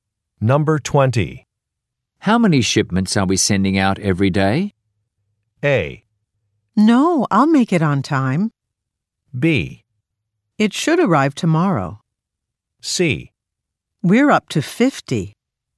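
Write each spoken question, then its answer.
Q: How many shipments are we sending out every day?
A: C: We're up to 50.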